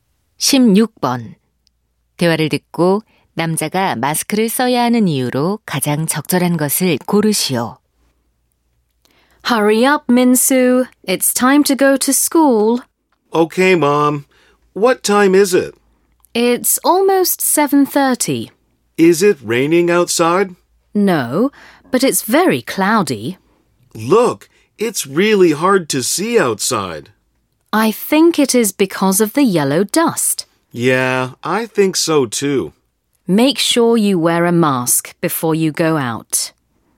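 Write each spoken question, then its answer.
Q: 대화를 듣고 남자가 마스크를 써야 하는 이유로 가장 적절한 것을 고르시오.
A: 황사 때문에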